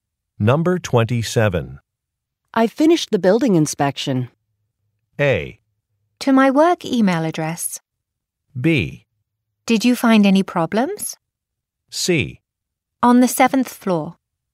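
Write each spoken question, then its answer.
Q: I finished the building inspection.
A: B: Did you find any problems?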